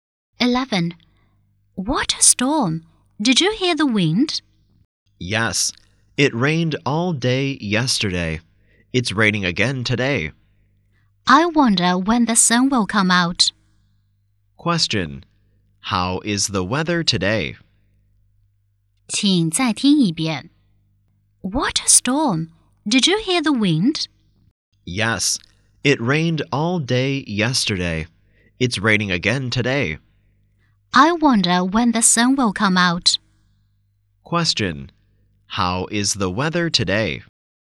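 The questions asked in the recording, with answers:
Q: Question: How is the weather today?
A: Rainy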